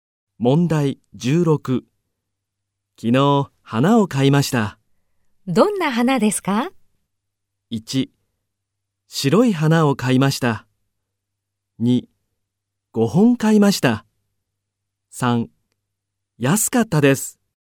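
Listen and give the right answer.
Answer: 1: 白い花を買いました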